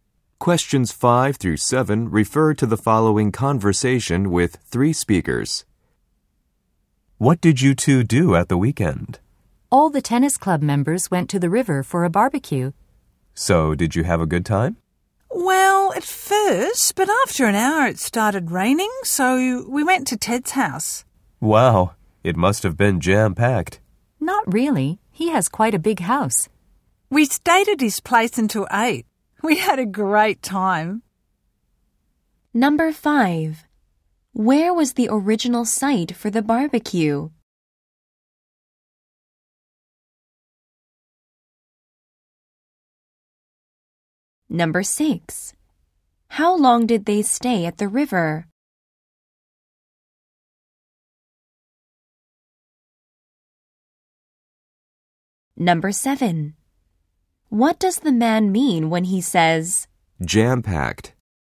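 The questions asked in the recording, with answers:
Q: Where was the original site for the barbecue?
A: By the river

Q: How long did they stay at the river?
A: About an hour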